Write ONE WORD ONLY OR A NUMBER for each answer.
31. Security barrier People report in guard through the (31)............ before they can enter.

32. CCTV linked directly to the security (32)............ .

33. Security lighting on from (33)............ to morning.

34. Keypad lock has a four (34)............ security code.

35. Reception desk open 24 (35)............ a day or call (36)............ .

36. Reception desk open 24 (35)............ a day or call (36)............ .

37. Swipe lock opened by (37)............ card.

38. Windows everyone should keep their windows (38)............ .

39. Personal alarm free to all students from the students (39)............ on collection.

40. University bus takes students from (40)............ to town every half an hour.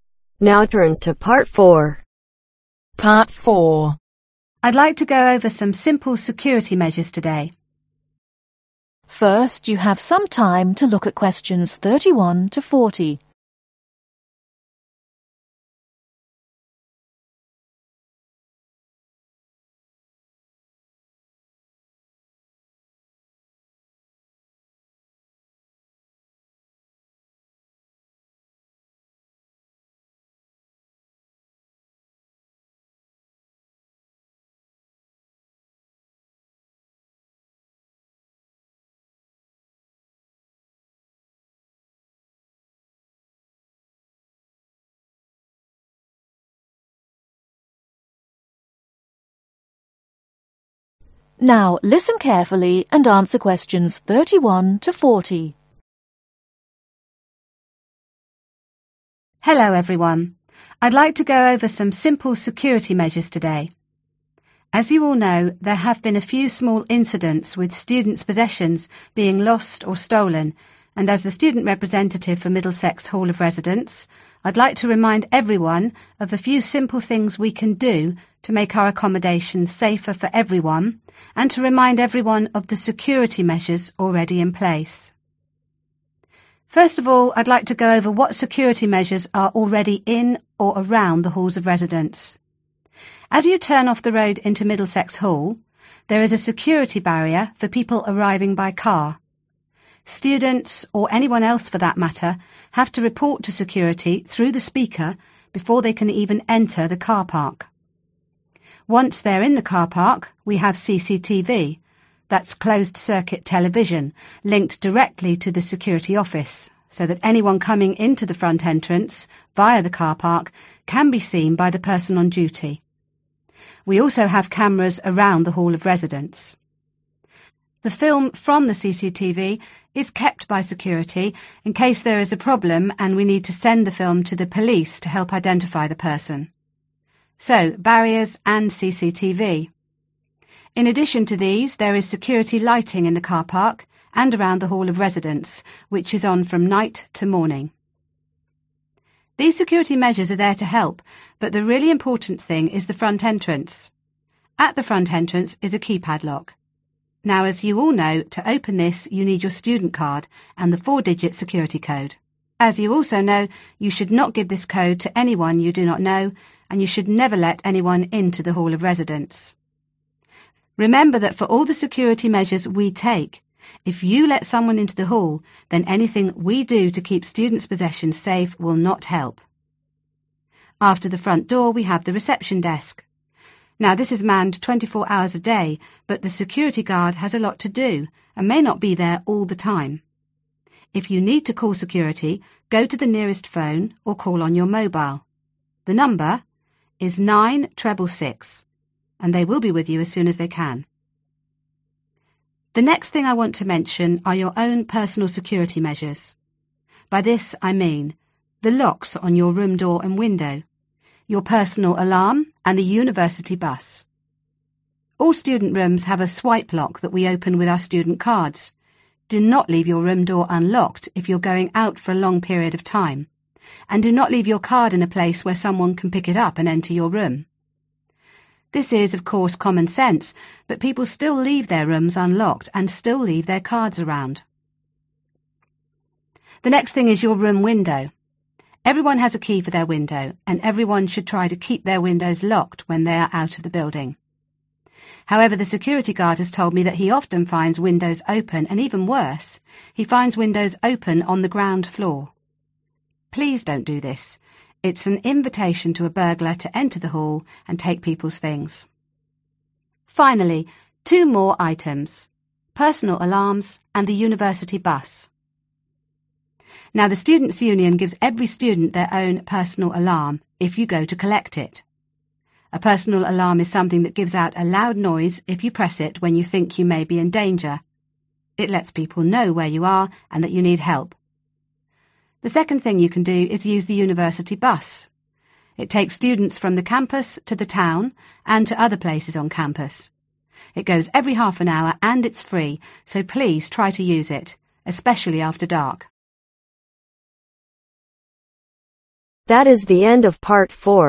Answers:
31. Speaker
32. Office
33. Night
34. Digit
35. Hours
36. 9666
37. Students
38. Locked
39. Union
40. Campus